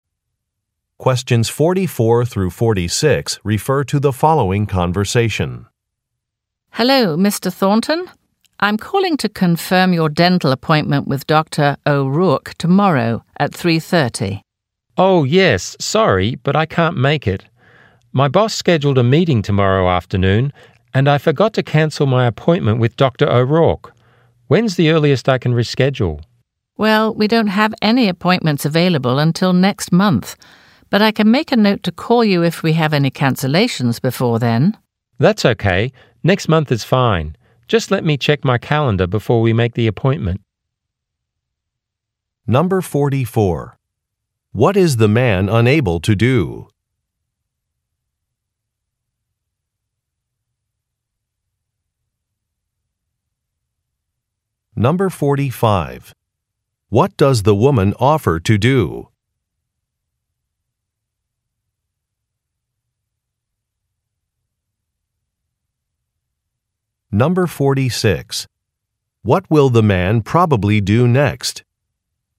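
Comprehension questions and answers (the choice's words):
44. What is the man unable to do?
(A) Make a reservation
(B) Keep an appointment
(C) Find a conference room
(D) Take some notes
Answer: Keep an appointment

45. What does the woman offer to do?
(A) Change the location of an event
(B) E-mail when a meeting time is confirmed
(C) Call if there is a cancellation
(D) Copy some records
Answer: Call if there is a cancellation

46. What will the man probably do next?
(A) Fill out a form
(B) Update a contact list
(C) Meet with a coworker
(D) Check a schedule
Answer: Check a schedule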